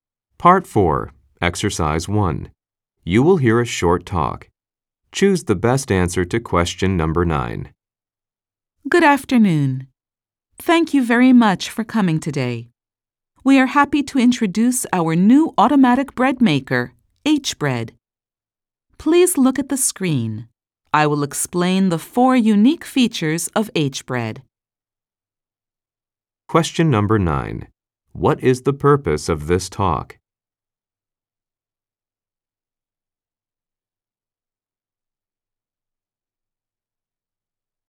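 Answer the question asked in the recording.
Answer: To introduce a new automatic bread maker, H-Bread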